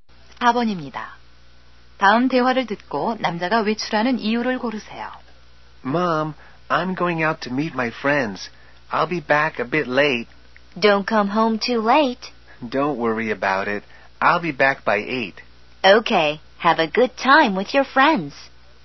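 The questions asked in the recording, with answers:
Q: 다음 대화를 듣고 남자가 외출하는 이유를 고르세요.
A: 친구들을 만나러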